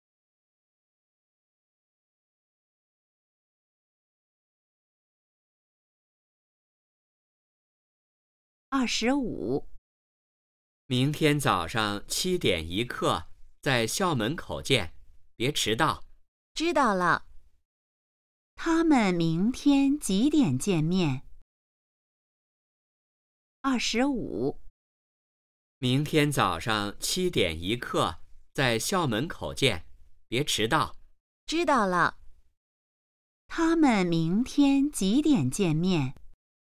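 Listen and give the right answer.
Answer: 早上7点一刻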